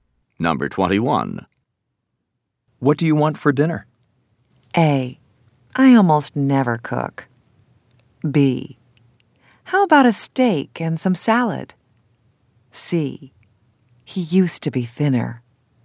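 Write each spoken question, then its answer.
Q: What do you want for dinner?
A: B: How about a steak and some salad?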